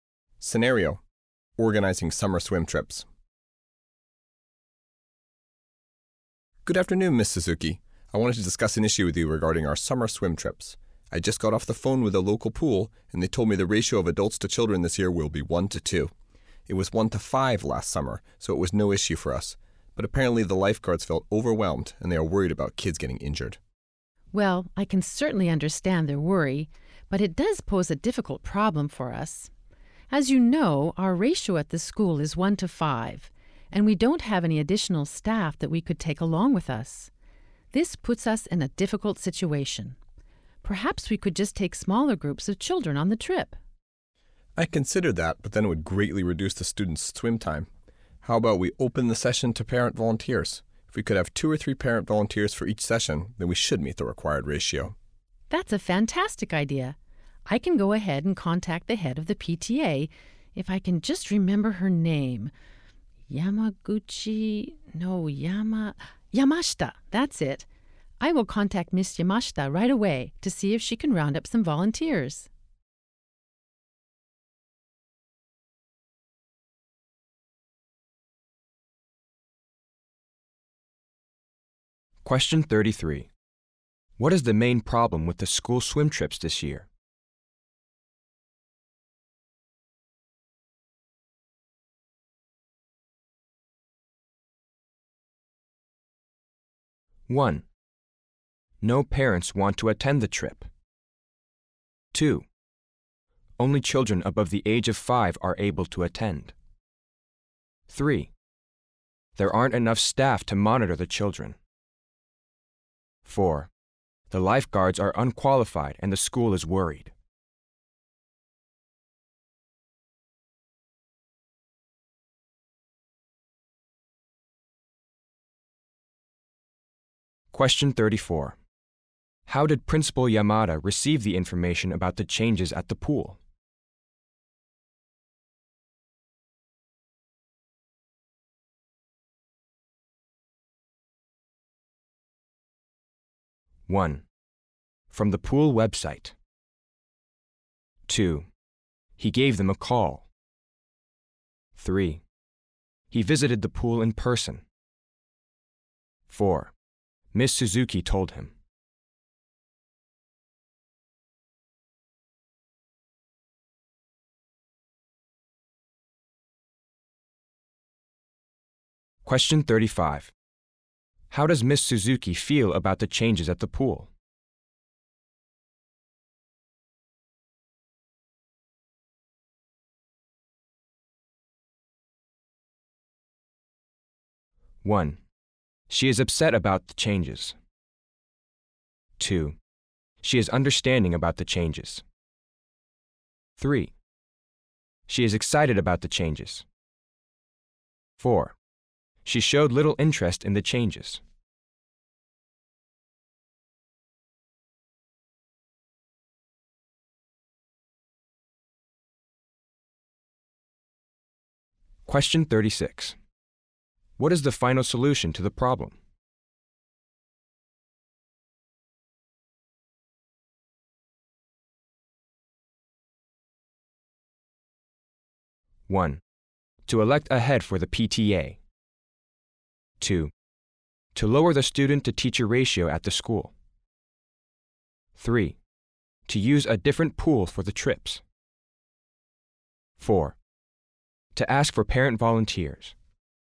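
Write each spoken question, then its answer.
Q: What is the main problem with the school swim trips this year?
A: 3: There aren't enough staff to monitor the children.

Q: How did Principal Yamada receive the information about the changes at the pool?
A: 2: he gave them a call.

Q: How does Miss Suzuki feel about the changes at the pool?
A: 2: She is understanding about the changes.

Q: What is the final solution to the problem?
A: 4: To ask for parent volunteers.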